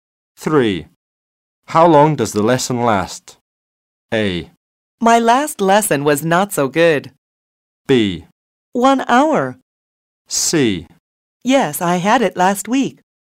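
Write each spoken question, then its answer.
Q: How long does the lesson last?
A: B: 1 hour.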